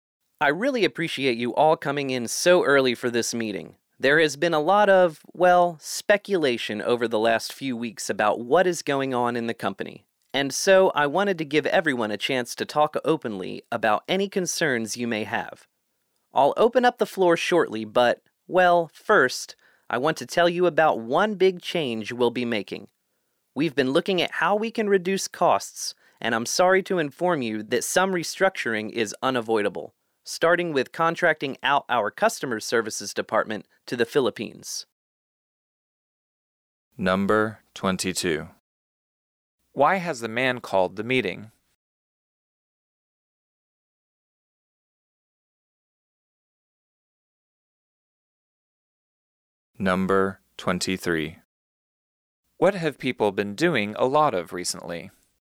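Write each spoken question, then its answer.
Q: What have people been doing a lot of recently?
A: Speculating about what is going on in the company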